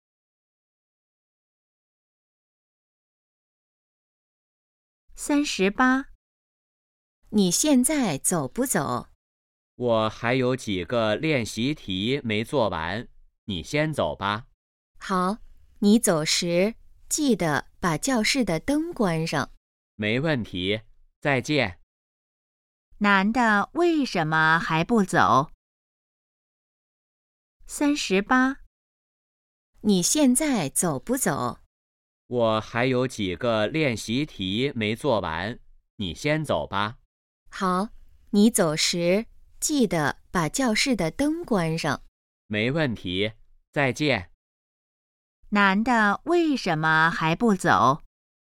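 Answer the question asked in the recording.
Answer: 练习题还没做完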